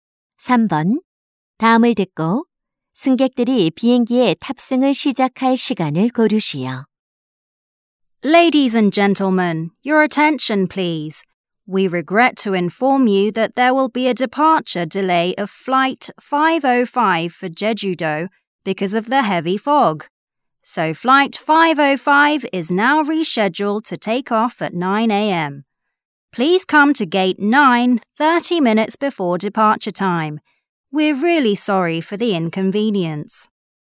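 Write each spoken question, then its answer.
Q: 다음을 듣고 승객들이 비행기에 탑승을 시작할 시간을 고르시오.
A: 오전 8시 30분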